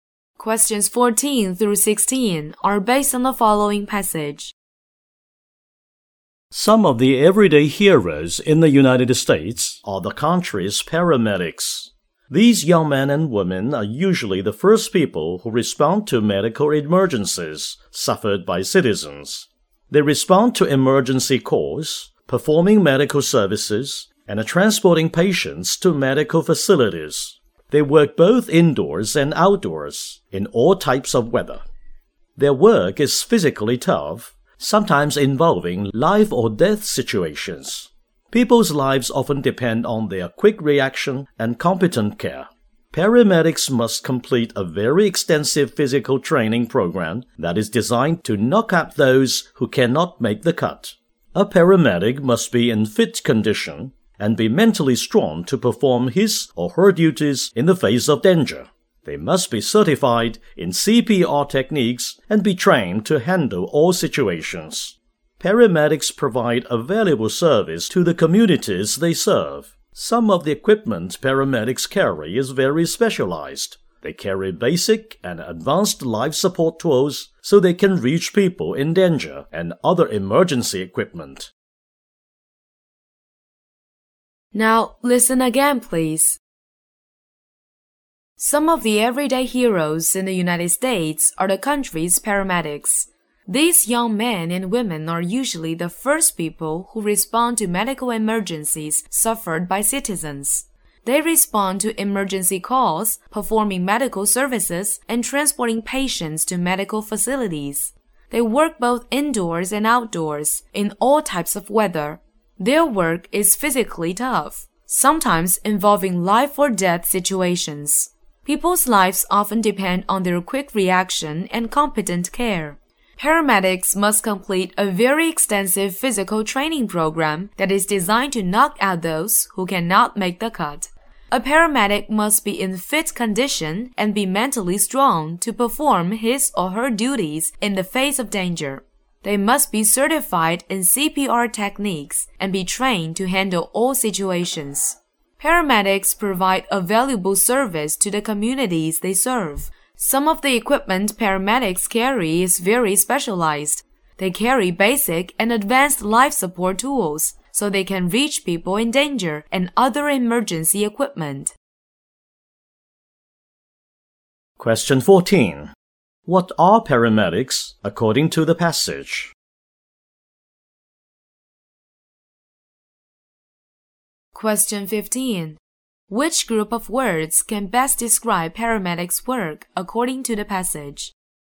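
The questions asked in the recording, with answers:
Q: What are paramedics according to the passage?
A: Everyday heroes who are first to respond to medical emergencies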